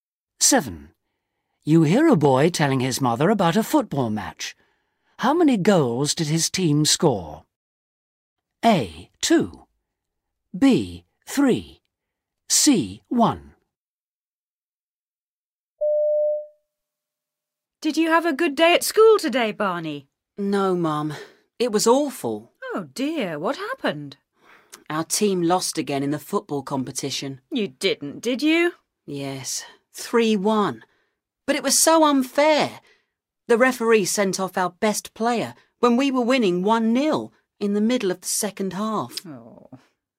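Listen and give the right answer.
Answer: C: 1.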